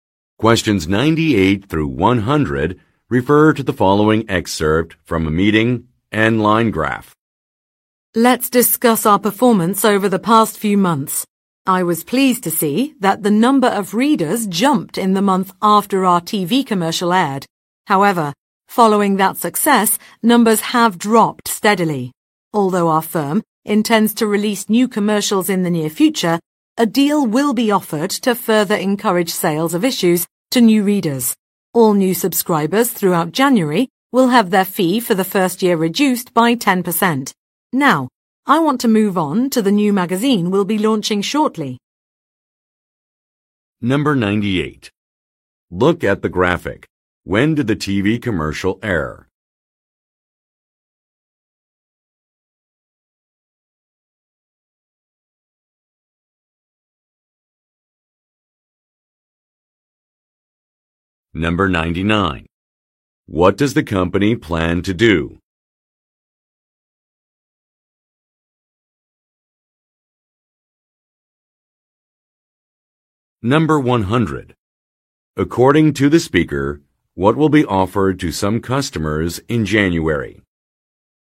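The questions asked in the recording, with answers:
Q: According to the speaker, what will be offered to some customers in January?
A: A 10% discount on the first-year subscription fee for new subscribers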